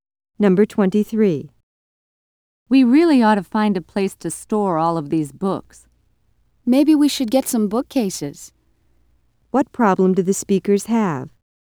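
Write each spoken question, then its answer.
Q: What problem do the speakers have?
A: They have nowhere to store their books.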